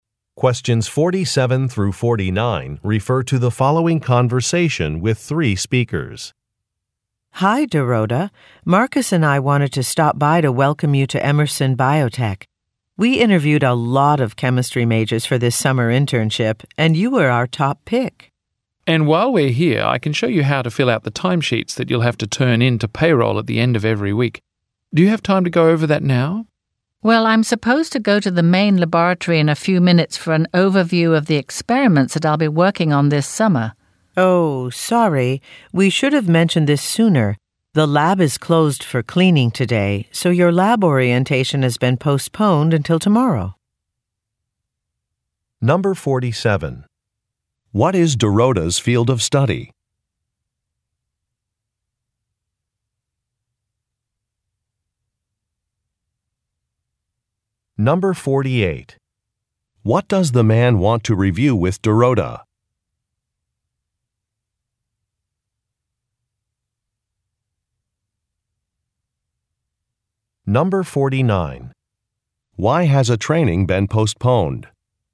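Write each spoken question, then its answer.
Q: What is Dorota's field of study?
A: Chemistry

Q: What does the man want to review with Dorota?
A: How to fill out timesheets

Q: Why has a training been postponed?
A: The lab is closed for cleaning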